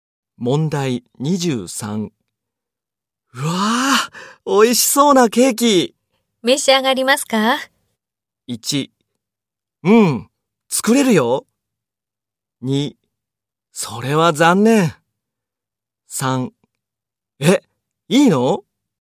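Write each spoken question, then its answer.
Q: 召し上がりますか?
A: 3: え、いいの?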